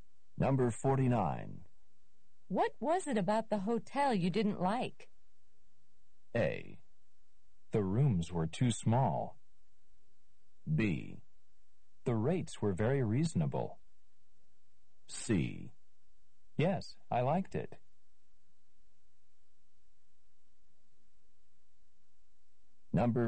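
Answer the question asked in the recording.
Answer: A: The rooms were too small.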